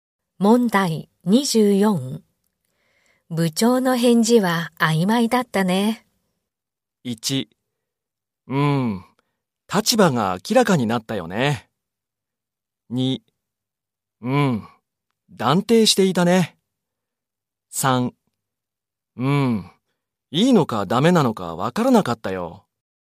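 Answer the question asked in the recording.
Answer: 3: いいのかダメなのかわからなかったよ。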